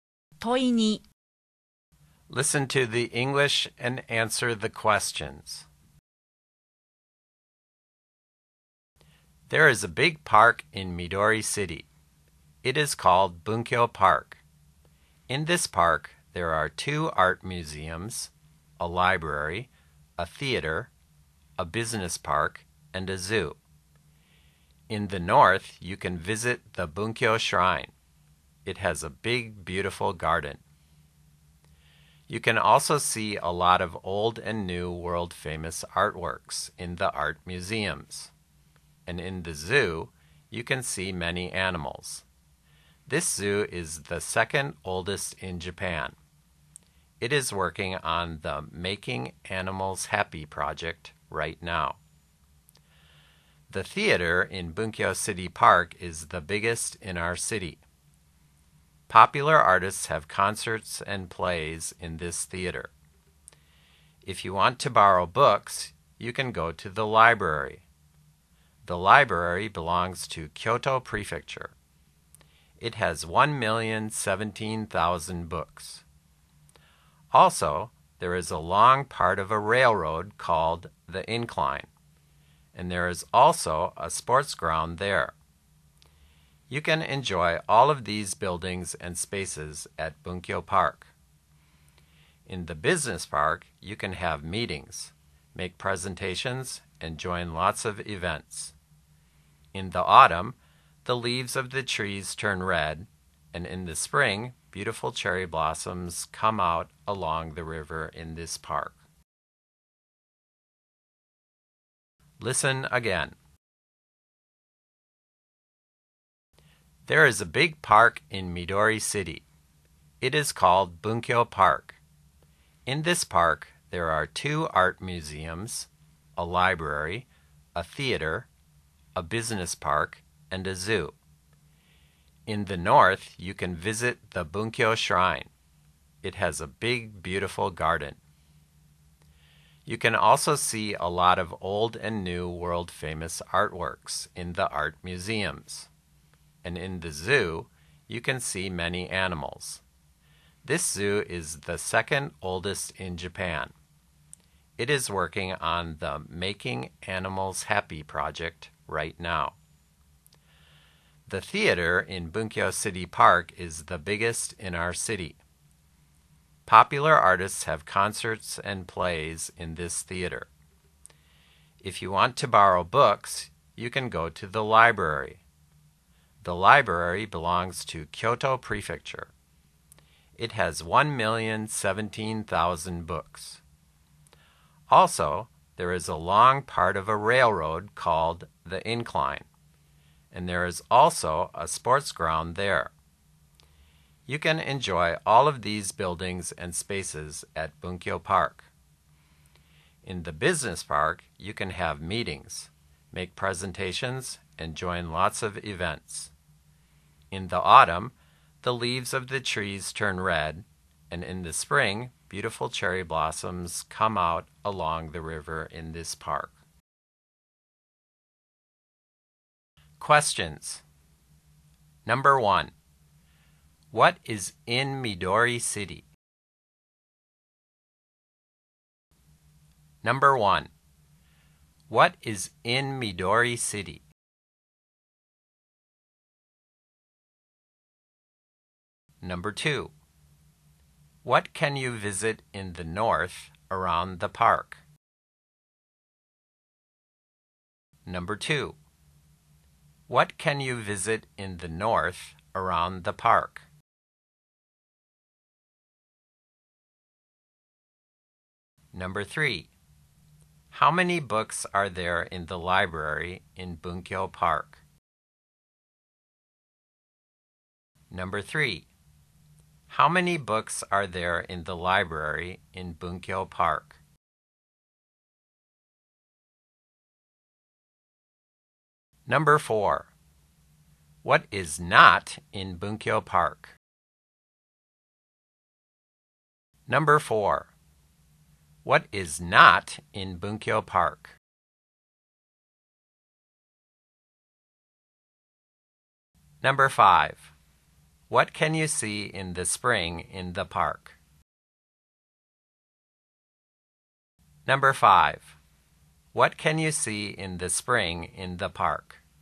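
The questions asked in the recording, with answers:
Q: What is in Midori City?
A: A big park called Bunkyo Park

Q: What can you visit in the north around the park?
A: Bunkyo Shrine

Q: How many books are there in the library in Bunkyo Park?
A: 1,017,000

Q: What can you see in the spring in the park?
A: Beautiful cherry blossoms along the river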